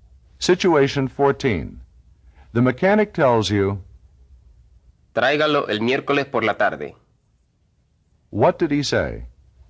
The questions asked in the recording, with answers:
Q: What did he say?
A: Bring it in Wednesday afternoon.